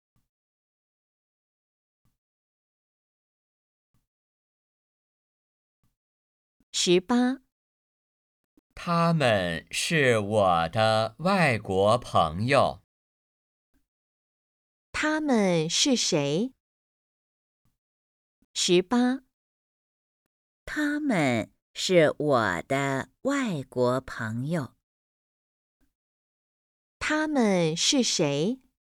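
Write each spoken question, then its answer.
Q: 他们是谁?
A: 外国朋友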